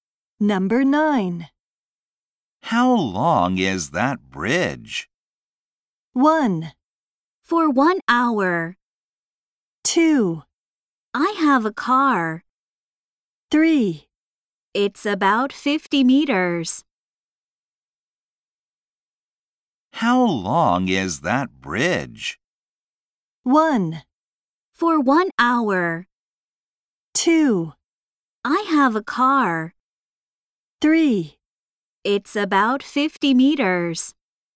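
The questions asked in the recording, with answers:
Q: How long is that bridge?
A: 3: It's about 50 meters.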